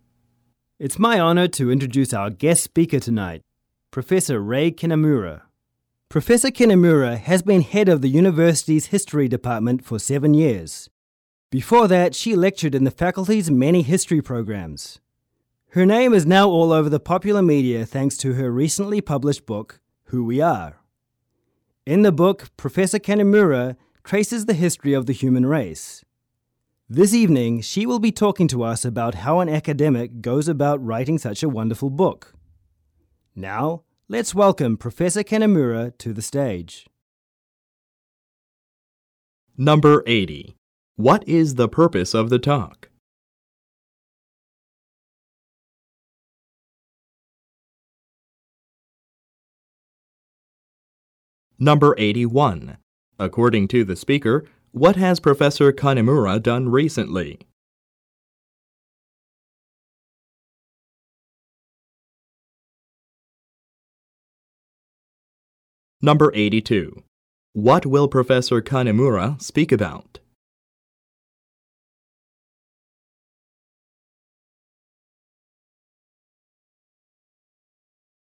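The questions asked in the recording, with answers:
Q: What is the purpose of the talk?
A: To introduce a guest speaker

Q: According to the speaker, what has Professor Kinamura done recently?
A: Published a book

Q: What will Professor Kinamura speak about?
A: How an academic goes about writing a book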